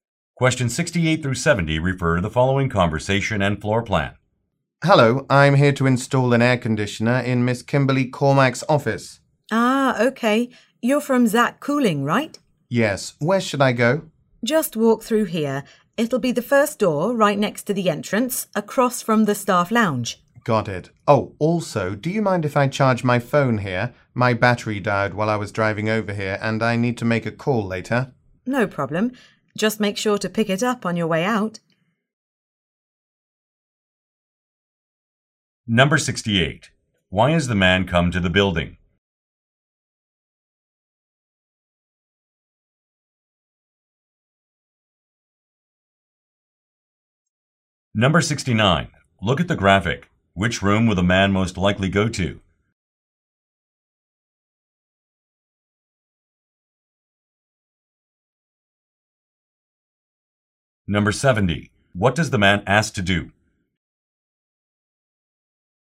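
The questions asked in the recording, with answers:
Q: Why has the man come to the building?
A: To install an air conditioner

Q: What does the man ask to do?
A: Charge his phone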